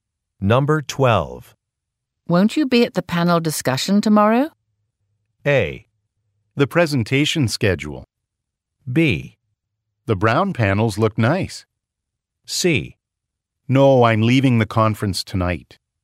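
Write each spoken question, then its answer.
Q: Won't you be at the panel discussion tomorrow?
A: C: No, I'm leaving the conference tonight.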